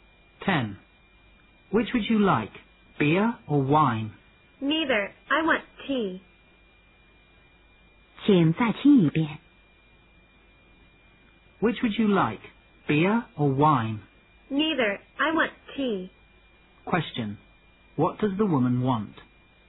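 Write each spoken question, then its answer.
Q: What does the woman want?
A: Tea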